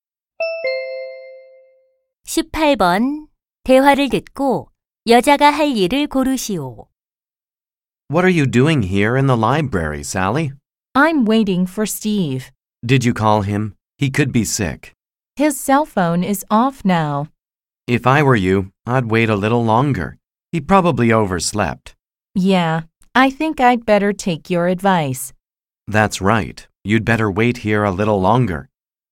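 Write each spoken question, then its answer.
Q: 대화를 듣고 여자가 할 일을 고르시오.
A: 도서관에서 Steve를 좀 더 기다린다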